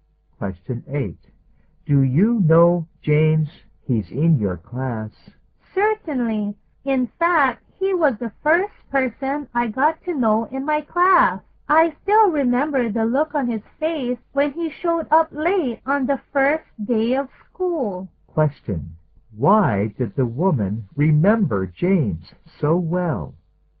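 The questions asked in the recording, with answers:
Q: Why did the woman remember James so well?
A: He arrived late on the first day of school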